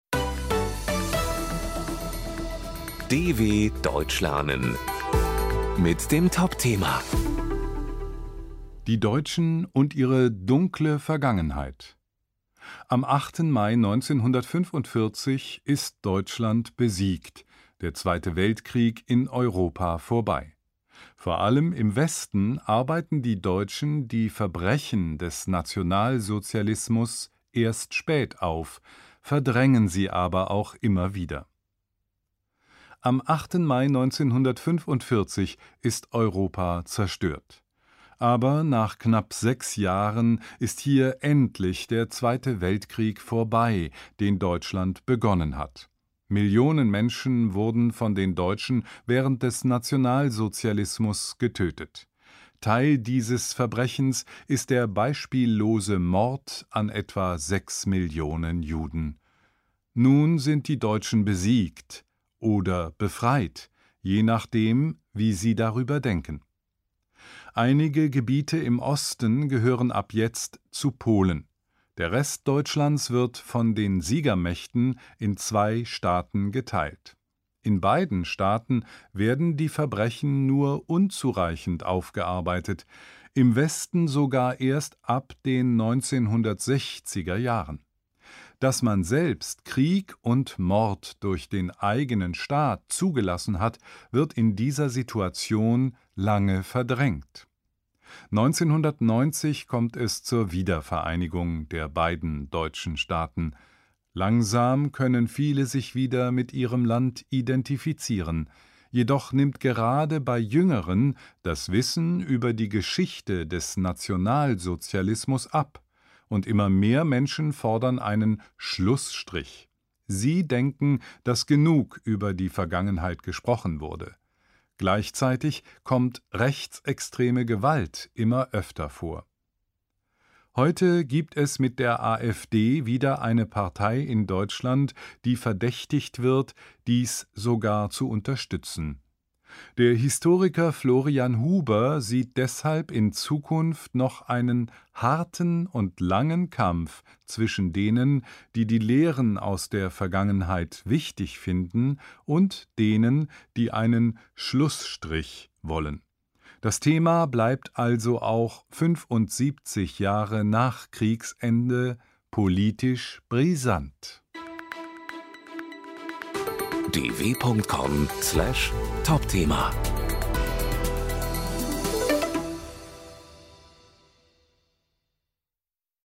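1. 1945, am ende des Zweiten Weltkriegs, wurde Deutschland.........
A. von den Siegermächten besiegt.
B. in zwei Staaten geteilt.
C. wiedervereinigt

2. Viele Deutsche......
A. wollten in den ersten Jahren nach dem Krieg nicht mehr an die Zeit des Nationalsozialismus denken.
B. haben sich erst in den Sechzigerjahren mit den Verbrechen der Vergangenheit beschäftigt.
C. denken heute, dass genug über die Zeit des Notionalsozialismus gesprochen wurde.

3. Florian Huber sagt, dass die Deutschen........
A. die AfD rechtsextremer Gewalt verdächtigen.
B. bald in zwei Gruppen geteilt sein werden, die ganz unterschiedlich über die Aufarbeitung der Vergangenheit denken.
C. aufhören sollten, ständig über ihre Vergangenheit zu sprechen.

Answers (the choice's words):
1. in zwei Staaten geteilt.
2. denken heute, dass genug über die Zeit des Notionalsozialismus gesprochen wurde.
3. bald in zwei Gruppen geteilt sein werden, die ganz unterschiedlich über die Aufarbeitung der Vergangenheit denken.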